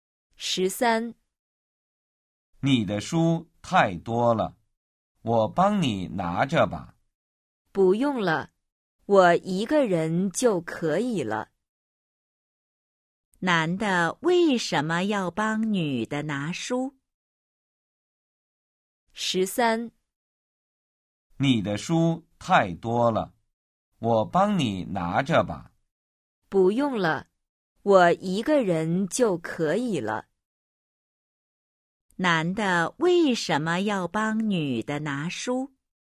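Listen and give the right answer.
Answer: 因为女的书太多了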